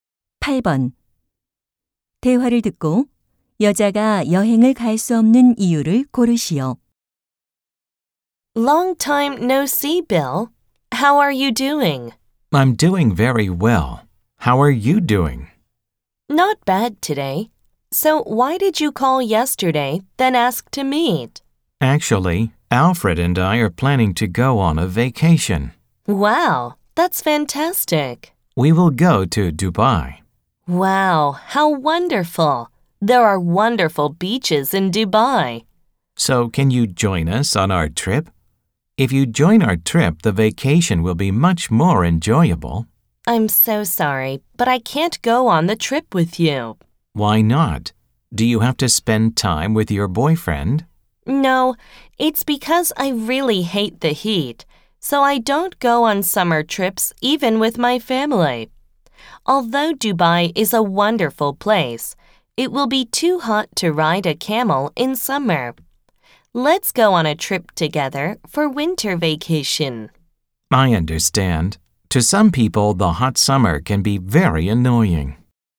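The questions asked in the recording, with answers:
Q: 대화를 듣고 여자가 여행을 갈 수 없는 이유를 고르시오.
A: 더위를 싫어해서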